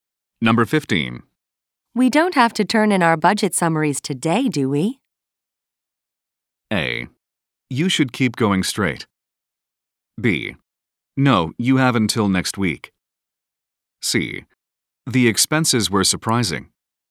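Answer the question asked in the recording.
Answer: B: No, you have until next week.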